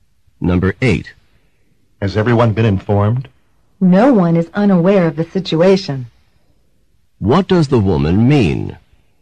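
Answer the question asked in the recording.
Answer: Everyone has been informed.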